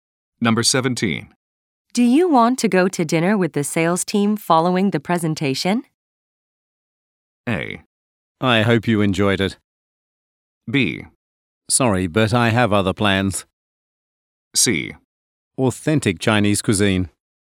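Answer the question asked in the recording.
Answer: B: Sorry, but I have other plans.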